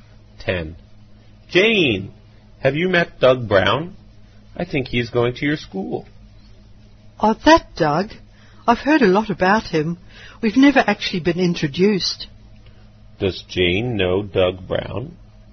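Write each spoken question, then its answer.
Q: Does Jane know Doug Brown?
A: No, she has only heard a lot about him; they've never been introduced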